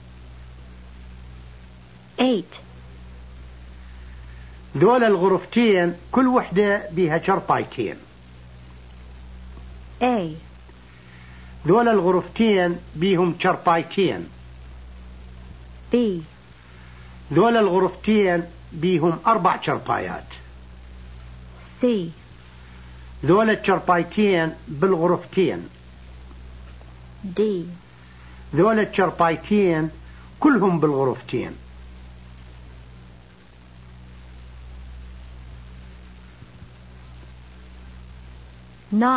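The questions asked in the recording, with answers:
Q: ذول الغرفتين كل وحدة بها شرطايتين.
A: B: ذول الغرفتين بيهم 4 شرفايات.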